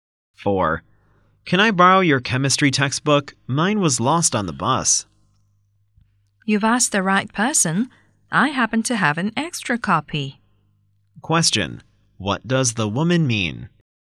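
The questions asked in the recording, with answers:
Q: What does the woman mean?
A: She can lend him her extra copy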